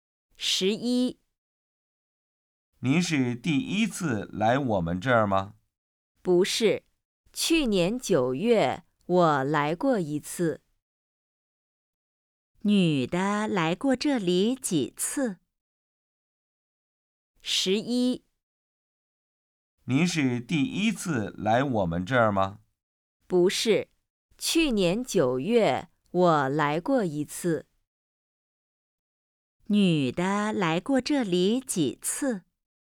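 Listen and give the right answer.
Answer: 一次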